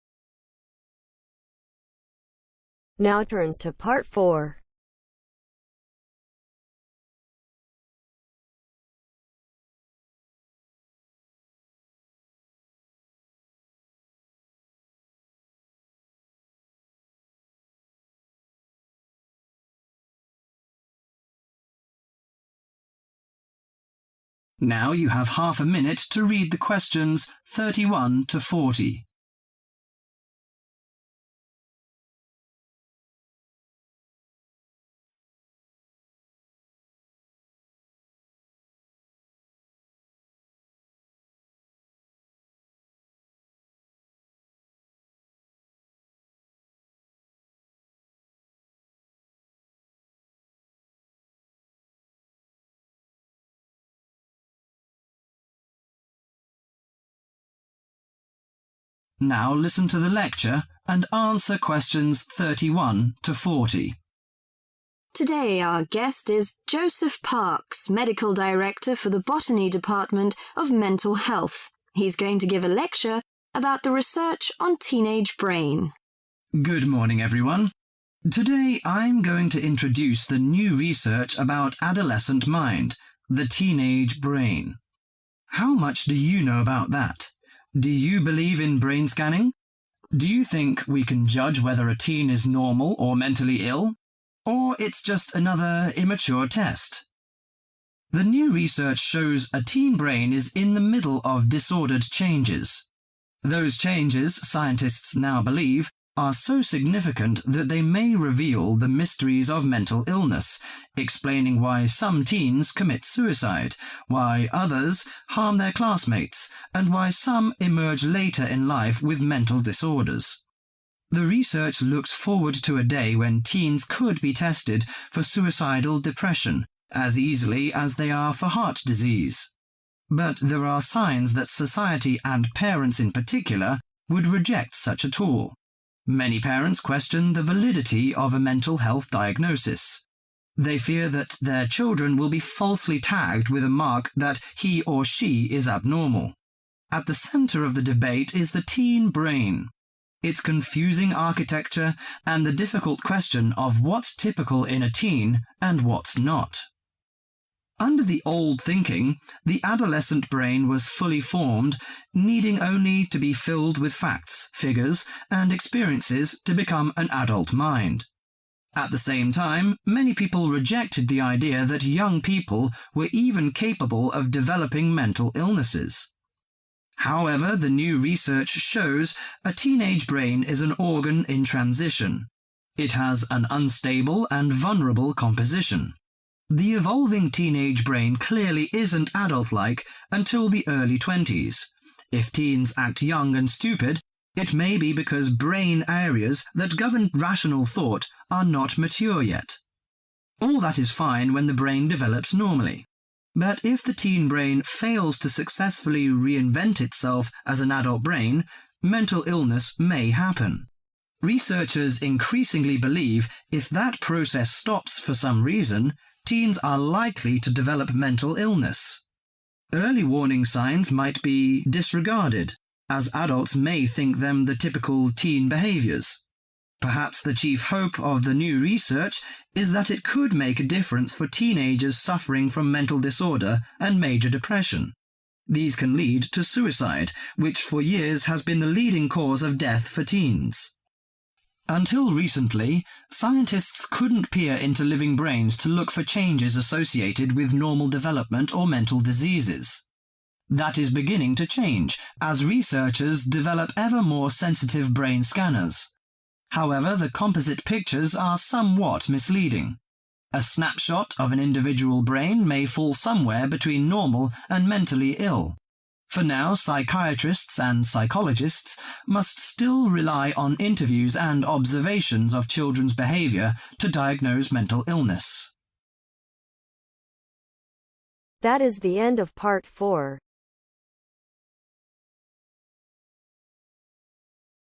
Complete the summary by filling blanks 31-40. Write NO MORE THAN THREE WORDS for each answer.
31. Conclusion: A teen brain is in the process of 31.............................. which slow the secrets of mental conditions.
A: Disordered changes

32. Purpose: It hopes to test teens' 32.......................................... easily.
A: Suicidal depressions

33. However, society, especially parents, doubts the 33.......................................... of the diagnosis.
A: Validity

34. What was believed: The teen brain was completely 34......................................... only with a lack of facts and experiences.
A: Formed

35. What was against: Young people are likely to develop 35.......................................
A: Mental diseases

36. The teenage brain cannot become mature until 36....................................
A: (early) 20s/twenties

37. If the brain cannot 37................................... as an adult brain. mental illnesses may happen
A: Reinvent itself

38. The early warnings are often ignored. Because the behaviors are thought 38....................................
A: Typical

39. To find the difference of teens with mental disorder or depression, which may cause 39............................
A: Suicide

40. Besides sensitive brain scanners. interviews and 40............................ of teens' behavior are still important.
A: Observations